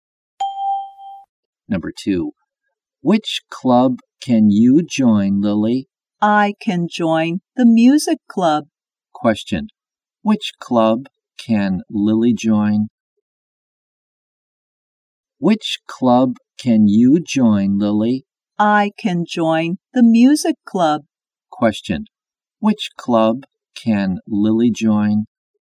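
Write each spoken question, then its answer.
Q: Which club can Lily join?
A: The music club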